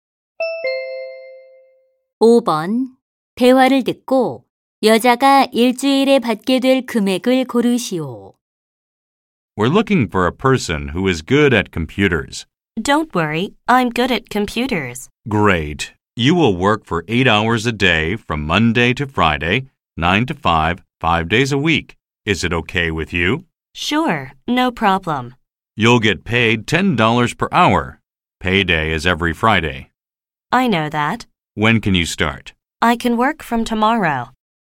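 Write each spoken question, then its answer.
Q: 대화를 듣고 여자가 일주일에 받게 될 금액을 고르시오.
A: 400달러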